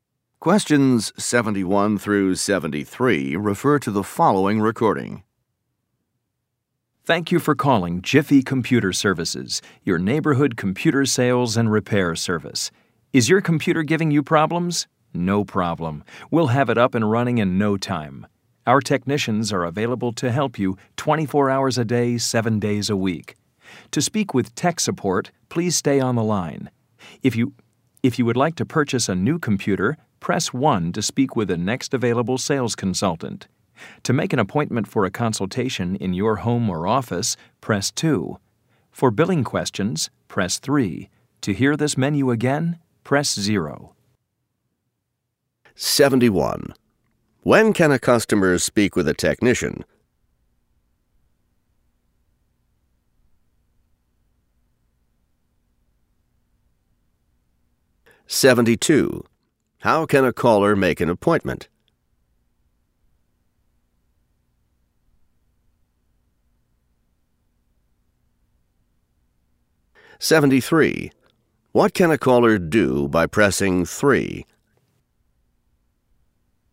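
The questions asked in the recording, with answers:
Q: When can a customer speak with a technician?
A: Any time, 24 hours a day, 7 days a week

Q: How can a caller make an appointment?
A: By pressing 2

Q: What can a caller do by pressing 3?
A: Ask billing questions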